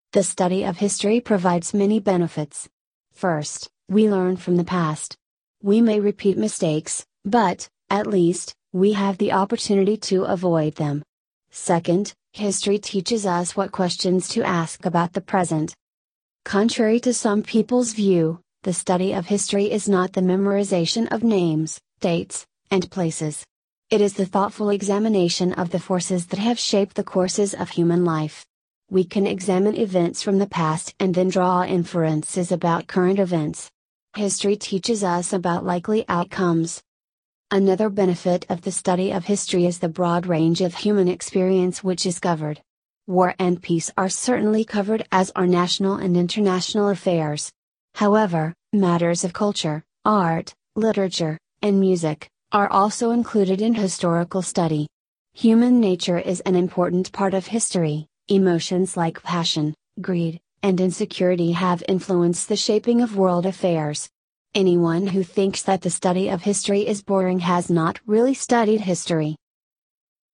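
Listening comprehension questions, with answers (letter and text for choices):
Listen to the recording and answer the multiple-choice question by selecting the correct response. Only one response is correct.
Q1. What is the main idea of this passage?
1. Studying history is not just memorization.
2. The role of education is to help the students deal with real life.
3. Studying history helps us to live in the today's world.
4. Students should study both national and international history.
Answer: 3. Studying history helps us to live in the today's world.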